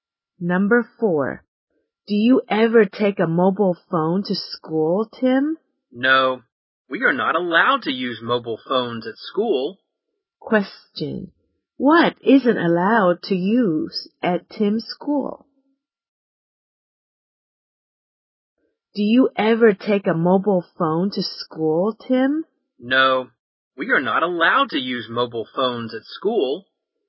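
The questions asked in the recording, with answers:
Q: What isn't allowed to use at Tim's school?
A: Mobile phones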